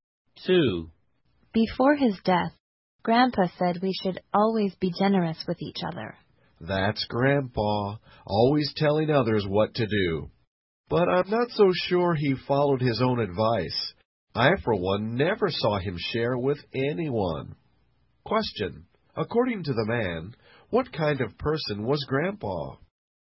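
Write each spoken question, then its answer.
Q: According to the man, what kind of person was Grandpa?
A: Someone who told others to be generous but wasn't generous himself.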